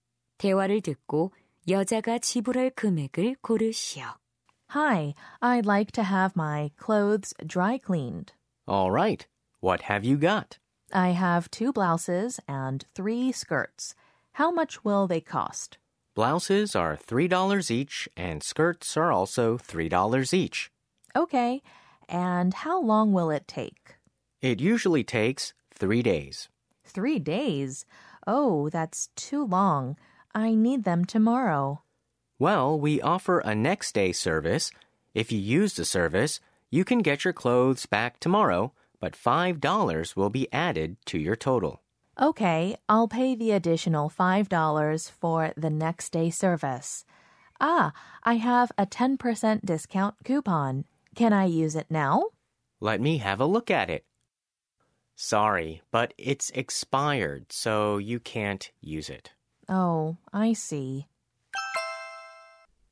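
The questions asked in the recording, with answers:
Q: 대화를 듣고 여자가 지불할 금액을 고르시오.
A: $20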